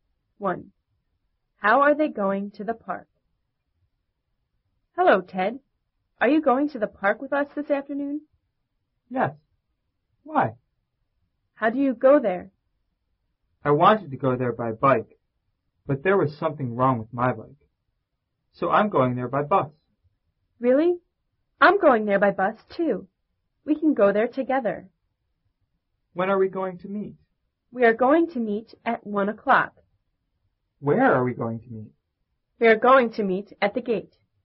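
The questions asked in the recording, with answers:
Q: How are they going to the park?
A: By bus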